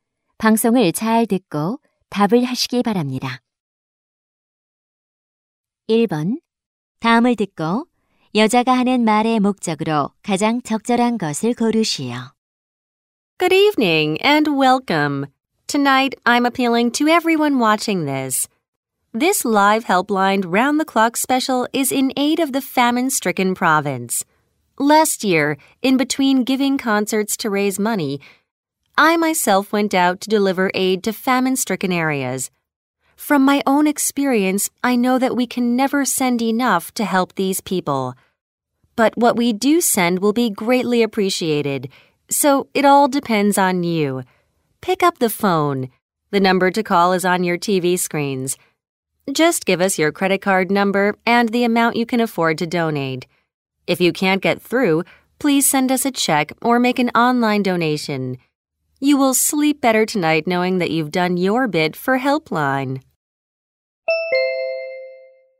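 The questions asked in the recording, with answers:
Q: 다음을 듣고 여자가 하는 말의 목적으로 가장 적절한 것을 고르시오.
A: 기근 피해 지역을 위한 기부를 요청하려고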